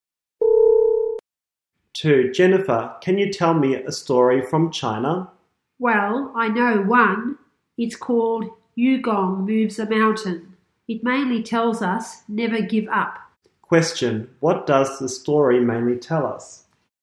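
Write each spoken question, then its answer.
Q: What does the story mainly tell us?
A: Never give up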